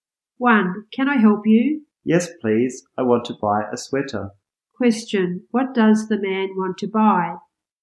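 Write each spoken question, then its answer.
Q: What does the man want to buy?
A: A sweater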